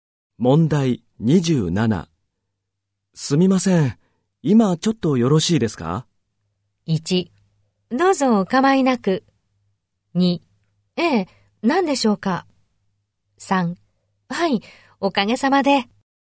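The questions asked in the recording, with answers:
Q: すみません、今ちょっとよろしいですか?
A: 2: ええ、何でしょうか?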